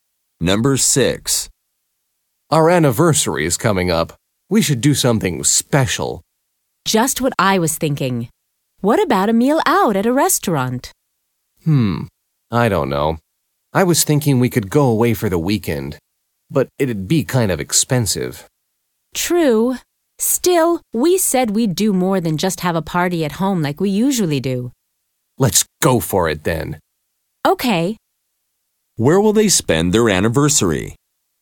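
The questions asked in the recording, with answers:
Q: Where will they spend their anniversary?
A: Away for the weekend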